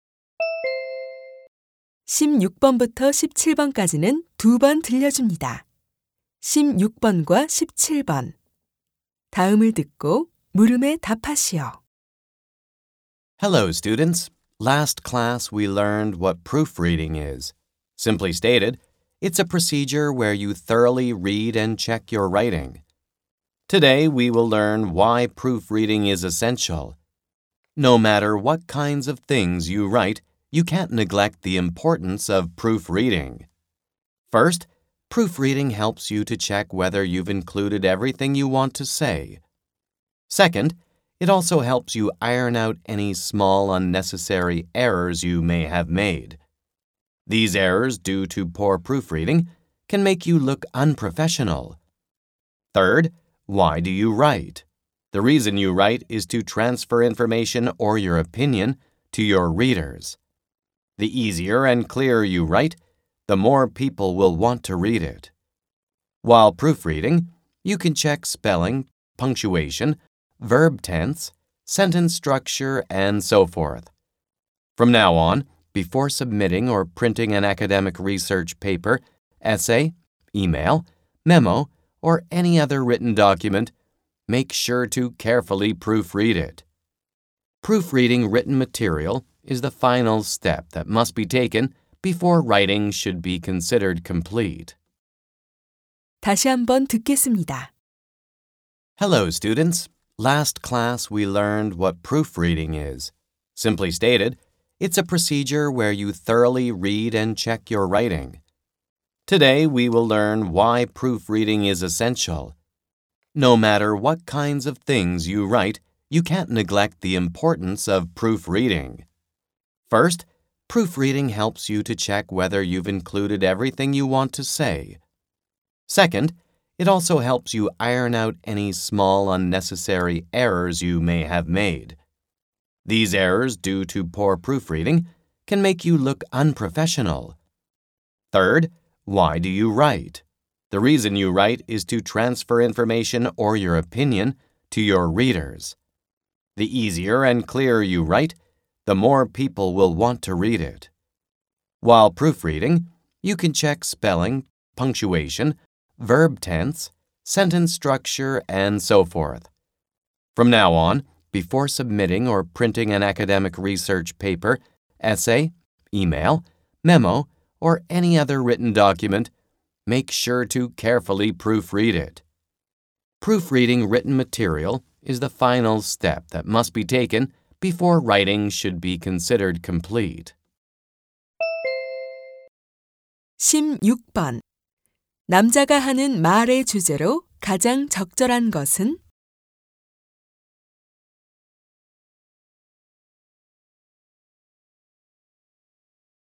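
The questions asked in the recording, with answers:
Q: 남자가 하는 말의 주제로 가장 적절한 것은?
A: 교정(proofreading)이 중요한 이유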